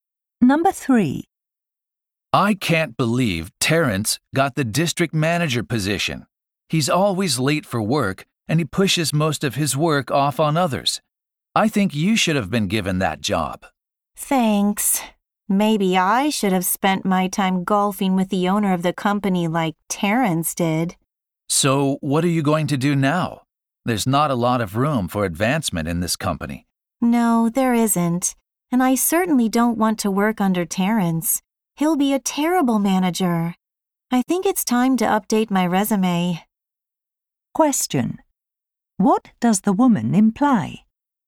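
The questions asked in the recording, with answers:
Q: What does the woman imply?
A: She is thinking of looking for a job at another company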